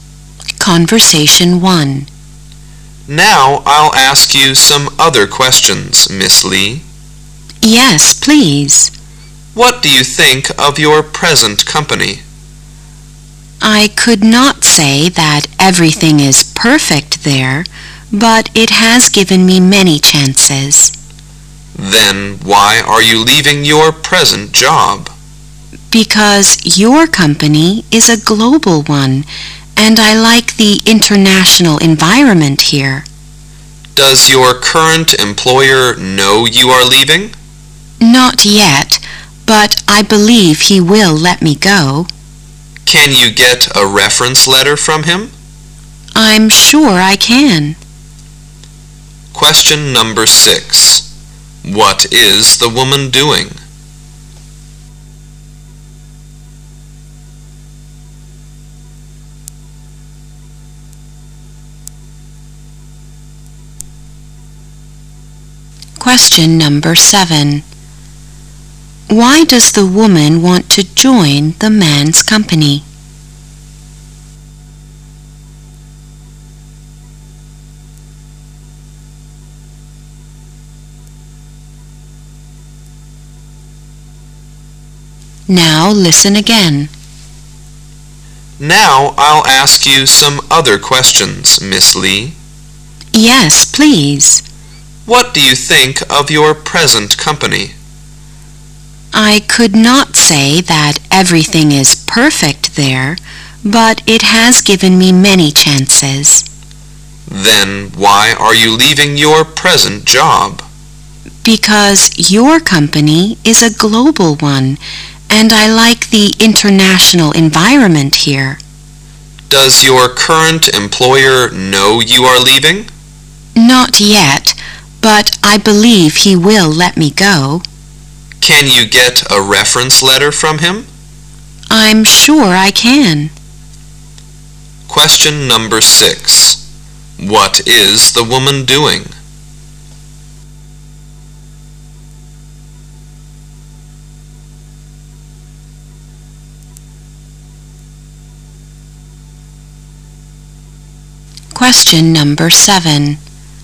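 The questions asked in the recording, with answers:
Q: What is the woman doing?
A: Having a job interview

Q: Why does the woman want to join the man's company?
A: It is a global company with an international environment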